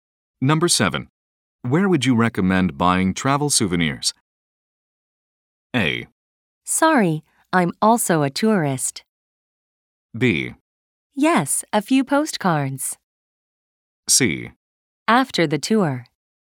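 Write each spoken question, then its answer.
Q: Where would you recommend buying travel souvenirs?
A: A: Sorry, I'm also a tourist.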